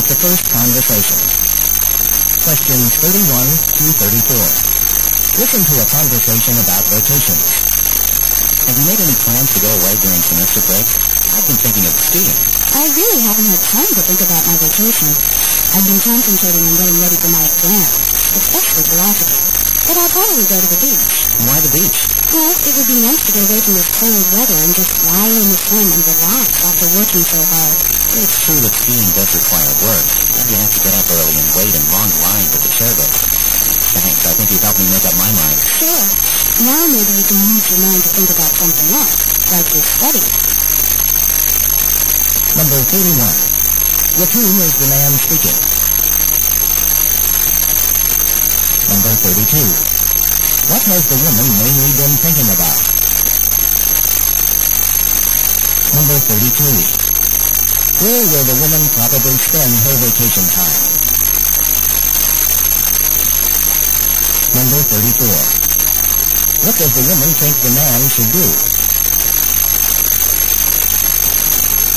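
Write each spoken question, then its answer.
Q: What has the woman mainly been thinking about?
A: Her exams, especially philosophy

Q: Where will the woman probably spend her vacation time?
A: At the beach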